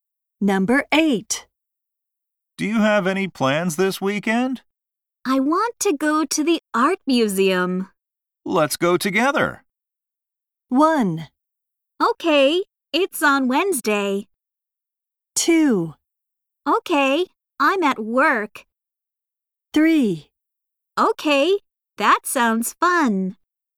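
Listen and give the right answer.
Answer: 3: Okay, that sounds fun.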